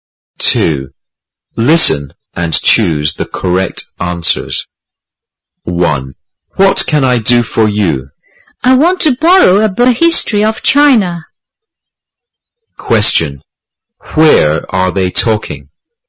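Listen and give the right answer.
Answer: In a library.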